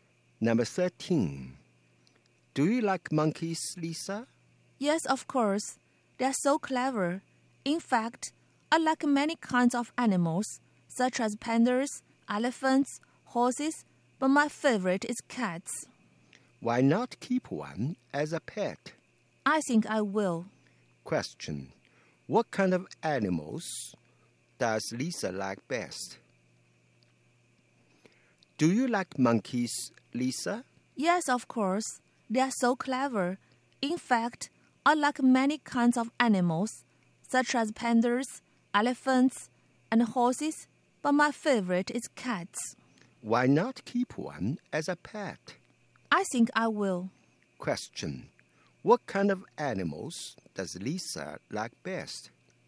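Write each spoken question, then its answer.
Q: What kind of animals does Lisa like best?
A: Cats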